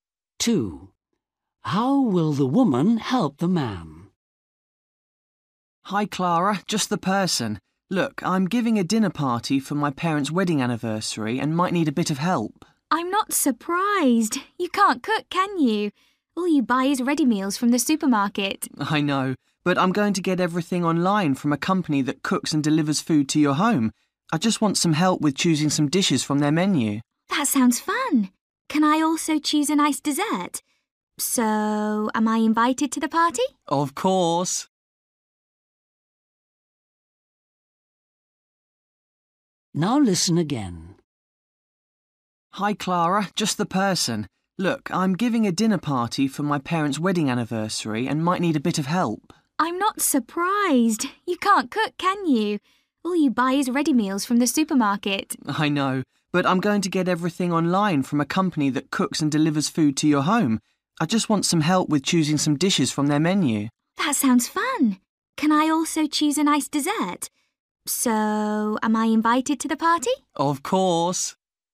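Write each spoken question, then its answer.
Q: How will the woman help the man?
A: by helping him choose dishes from an online menu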